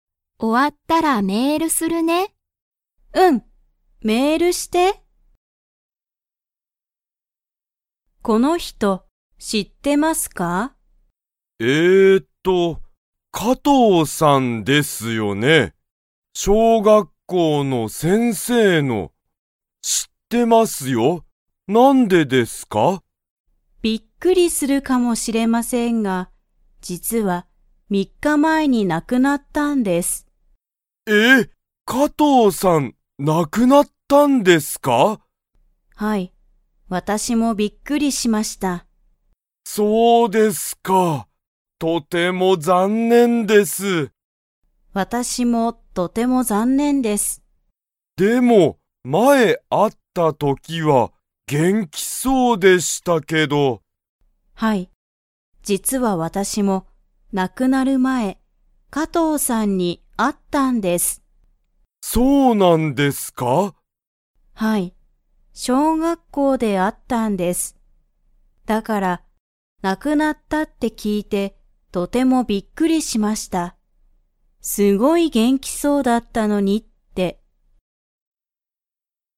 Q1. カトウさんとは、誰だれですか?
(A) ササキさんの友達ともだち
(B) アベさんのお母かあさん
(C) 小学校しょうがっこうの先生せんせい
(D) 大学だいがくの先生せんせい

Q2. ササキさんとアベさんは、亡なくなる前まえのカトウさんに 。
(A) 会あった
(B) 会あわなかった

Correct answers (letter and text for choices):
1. (C) 小学校しょうがっこうの先生せんせい
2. (A) 会あった

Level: Level 3